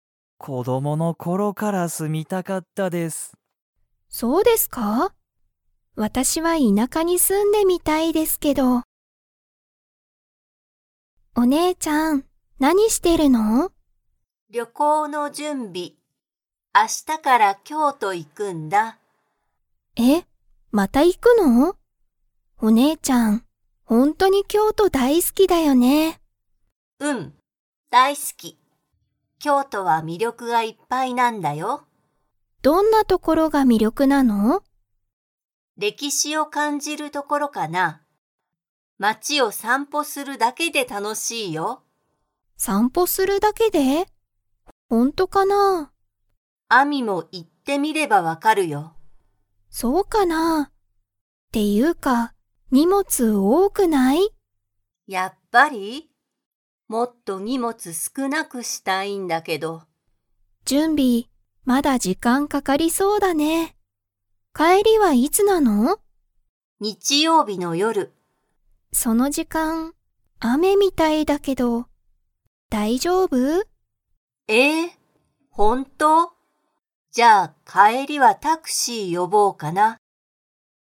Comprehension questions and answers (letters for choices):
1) 京都きょうとは、街まちを するだけで楽たのしい。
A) 準備じゅんび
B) 料理りょうり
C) 散歩さんぽ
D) 買かい物もの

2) カオリは、荷物にもつをもっと少すくなくしたいですか?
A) はい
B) いいえ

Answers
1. C
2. A

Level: Level 4